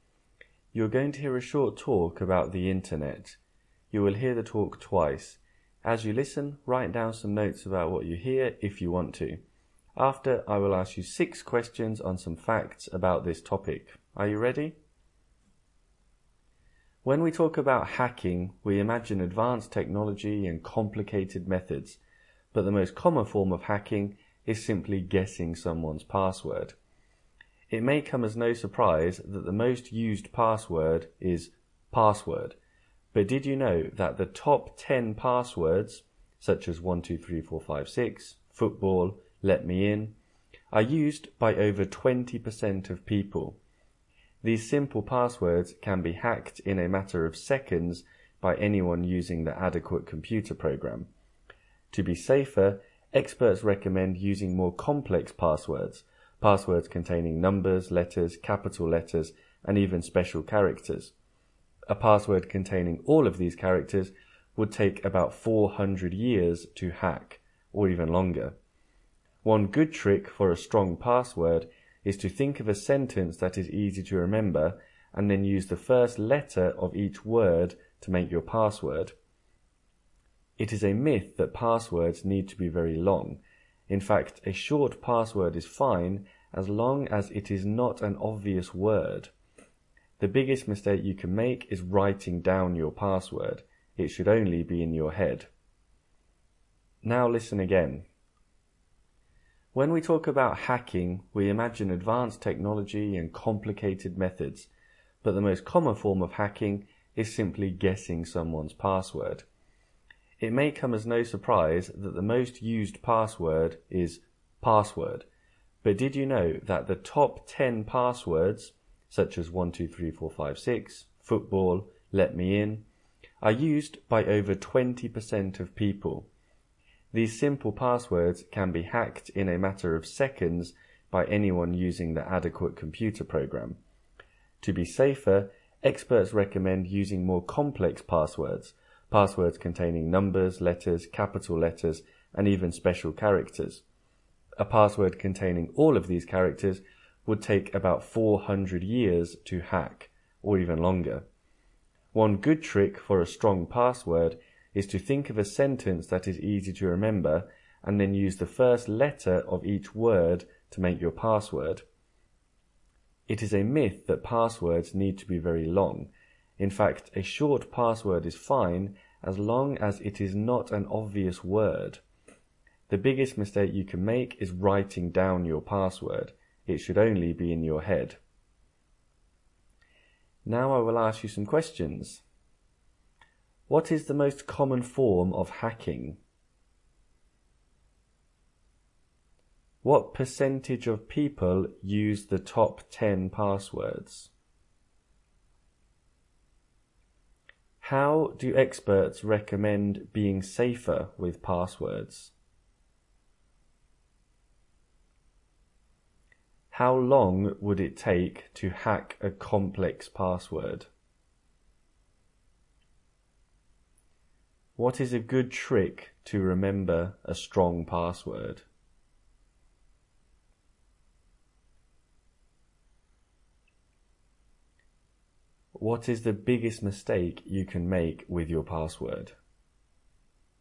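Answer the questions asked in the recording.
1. Guessing someone's password
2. Over 20%
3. Using more complex passwords with numbers, letters, capital letters and special characters
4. About 400 years or longer
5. Think of an easy-to-remember sentence and use the first letter of each word
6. Writing it down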